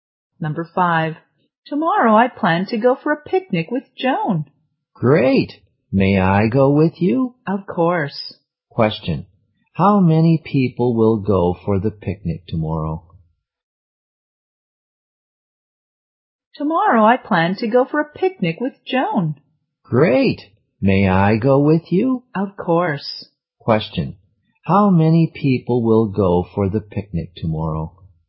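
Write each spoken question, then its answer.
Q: how many people will go for the picnic tomorrow?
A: Three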